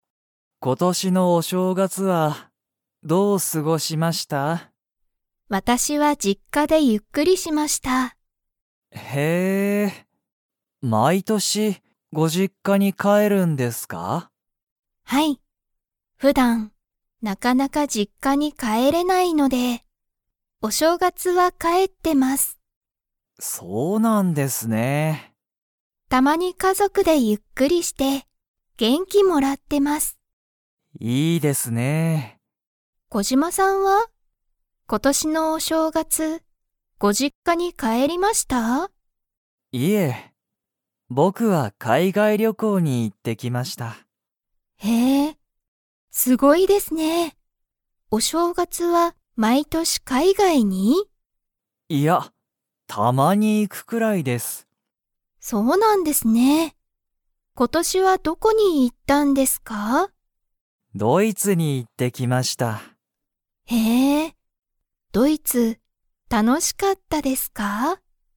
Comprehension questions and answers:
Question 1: 佐藤さとうさんは、毎年まいとしお正月しょうがつに実家じっかに 。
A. 帰かえる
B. 帰かえらない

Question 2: 小島こじまさんは、今年ことしのお正月しょうがつにどこへ行いきましたか?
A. 実家じっか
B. 海外かいがい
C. 日本にほん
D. 仕事しごと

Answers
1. A. 帰かえる
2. B. 海外かいがい

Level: Level 4

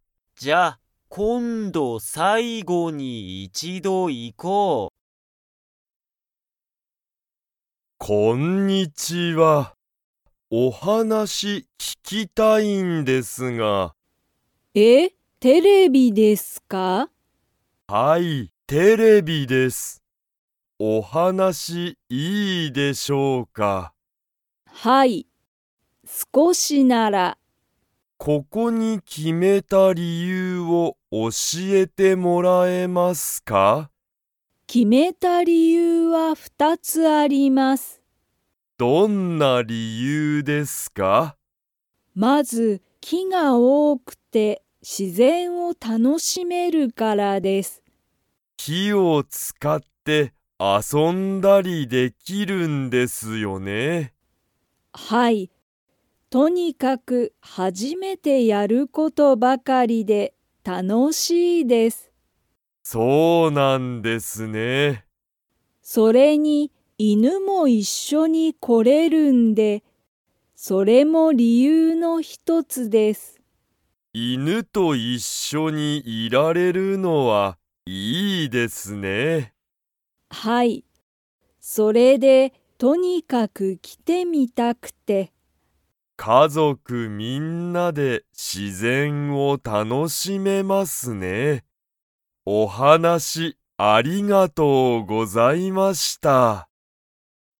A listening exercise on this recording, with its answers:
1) めぐみは、アナウンサーと話(はな)しますか?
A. はい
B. いいえ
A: A. はい

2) ここは、家族(かぞく)みんなで____を楽(たの)しめる。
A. 犬(いぬ)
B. テレビ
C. 自然(しぜん)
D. 話(はなし)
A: C. 自然(しぜん)

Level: Level 2

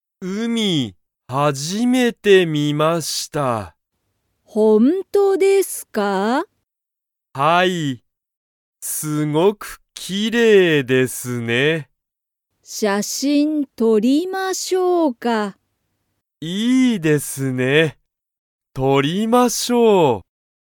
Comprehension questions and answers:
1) 海(うみ)は____。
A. とても好(す)きだ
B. 写真(しゃしん)を見(み)た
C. すごくきれいだ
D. 車(くるま)で来(き)た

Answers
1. C. すごくきれいだ

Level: Level 1

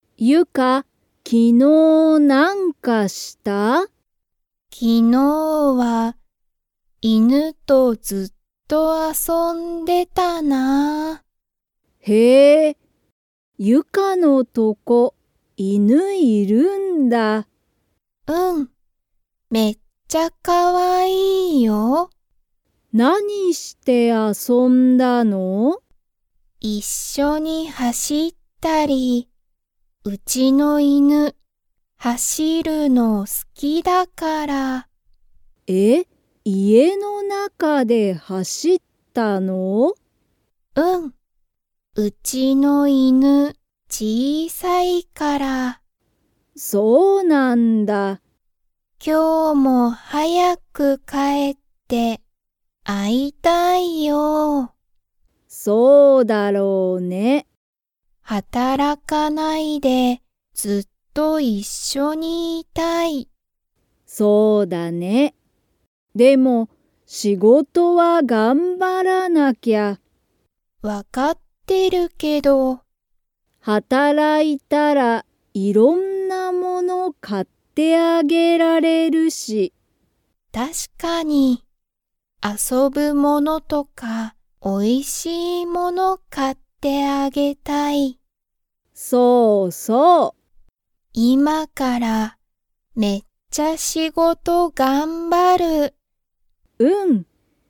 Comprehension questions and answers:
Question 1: ゆかの犬(いぬ)は____のが好(す)きだ。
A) 走(はし)る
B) 会(あ)う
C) 働(はたら)く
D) 頑張(がんば)る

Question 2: ゆかの犬(いぬ)は、小(ちい)さいですか?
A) はい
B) いいえ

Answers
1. A) 走(はし)る
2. A) はい

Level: Level 2

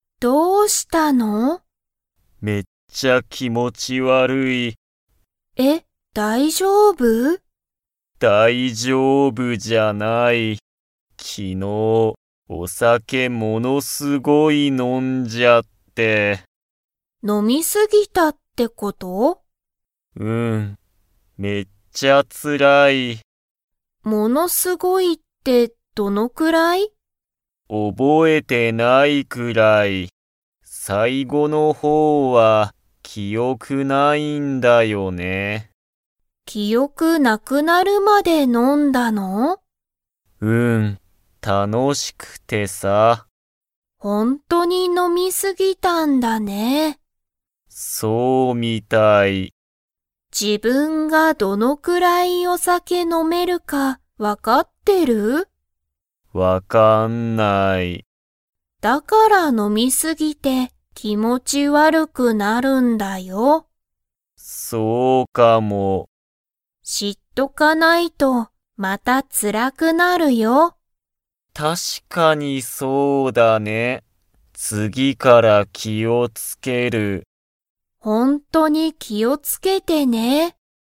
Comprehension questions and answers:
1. 山田やまだくんは、いつお酒さけを飲のみ過すぎましたか?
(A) 昨日きのう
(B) 今日きょう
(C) 明日あした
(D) 3日みっか前まえ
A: (A) 昨日きのう

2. 山田やまだくんは、自分じぶんがどのくらい飲のめるか 。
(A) 分わかってる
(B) 分わかってない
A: (B) 分わかってない

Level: Level 3

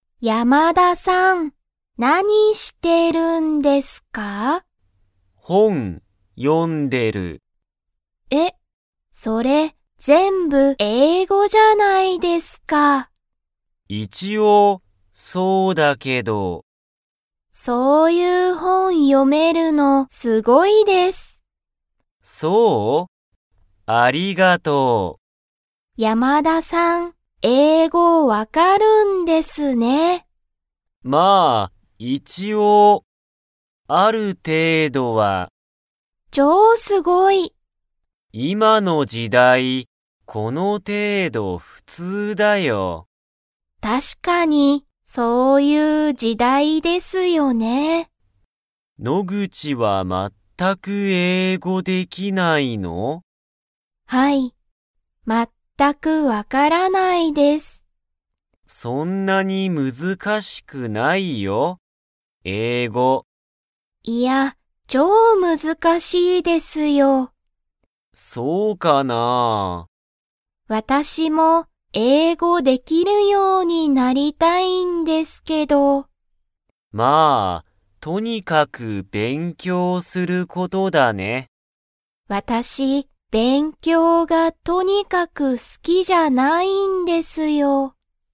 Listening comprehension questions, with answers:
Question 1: 山田(やまだ)さんは____の本(ほん)を読(よ)んでいる。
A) 日本語(にほんご)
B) 昔むかし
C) 英語(えいご)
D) 勉強(べんきょう)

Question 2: 野口(のぐち)さんは英語(えいご)ができますか?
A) はい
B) いいえ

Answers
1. C) 英語(えいご)
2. B) いいえ

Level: Level 2

